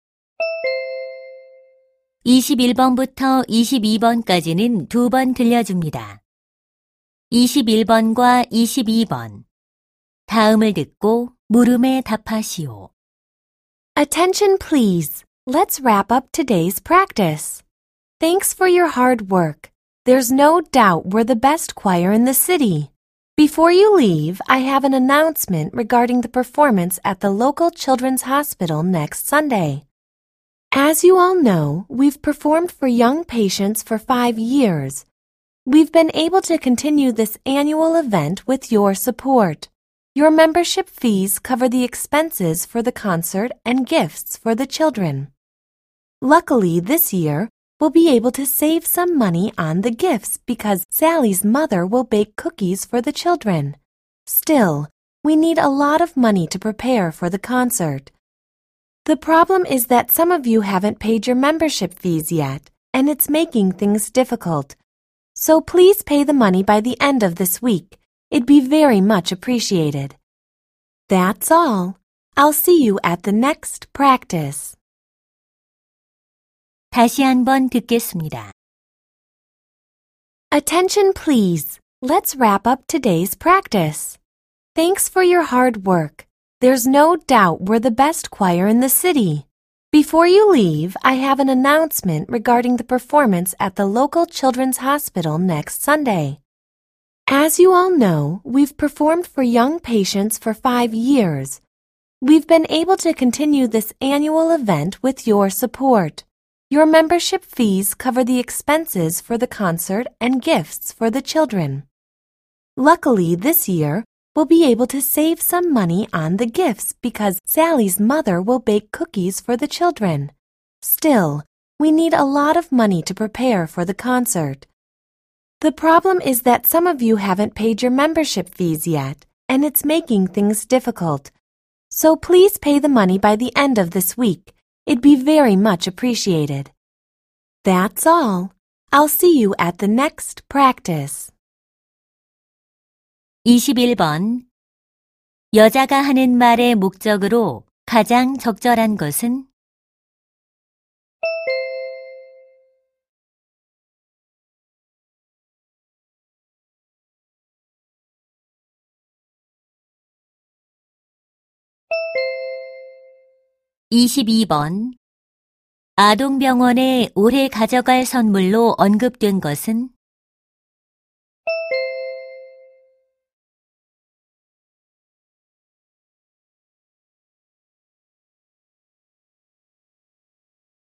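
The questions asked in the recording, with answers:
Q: 여자가 하는 말의 목적으로 가장 적절한 것은?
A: 밀린 회비 납부를 요청하려고

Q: 아동병원에 올해 가져갈 선물로 언급된 것은?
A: 쿠키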